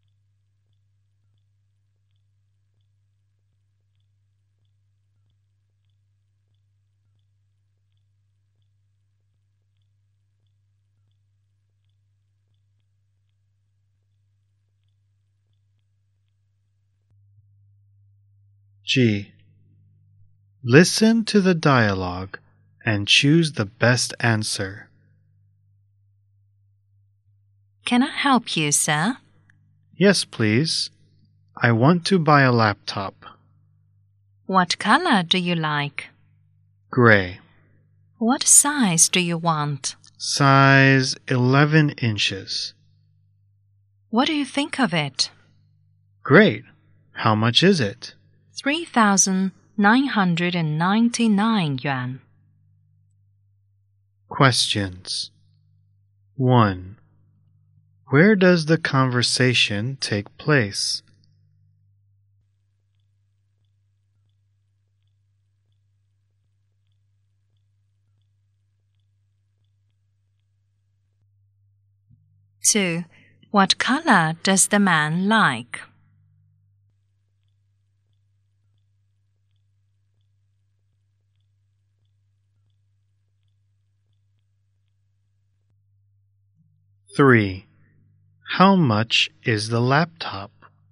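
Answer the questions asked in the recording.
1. In a shop selling laptops
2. Gray
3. 3,999 yuan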